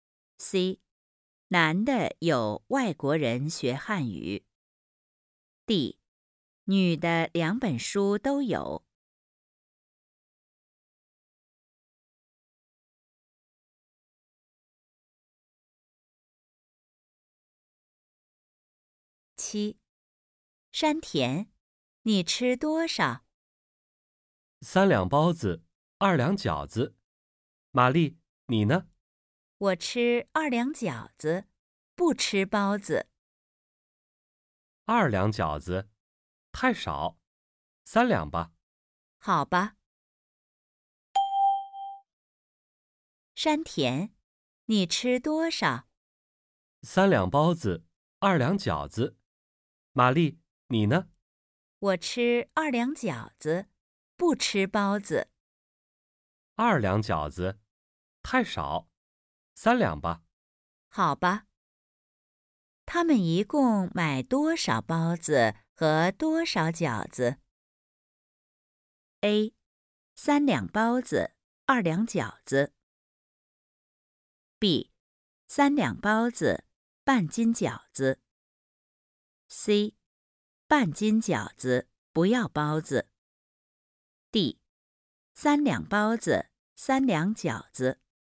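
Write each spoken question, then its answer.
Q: 他们一共买多少包子和多少饺子?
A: B: 三两包子,半斤饺子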